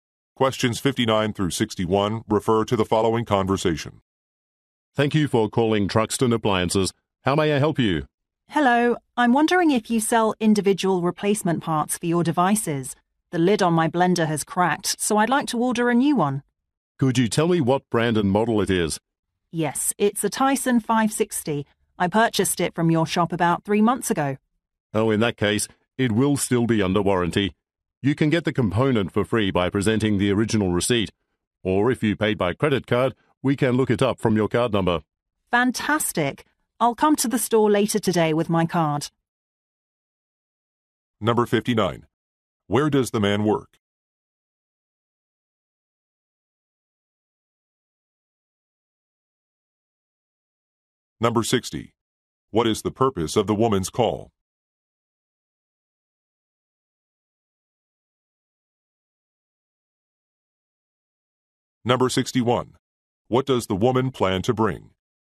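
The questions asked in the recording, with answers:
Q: Where does the man work?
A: At an appliance store

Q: What is the purpose of the woman's call?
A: To order a replacement blender lid

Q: What does the woman plan to bring?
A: Her credit card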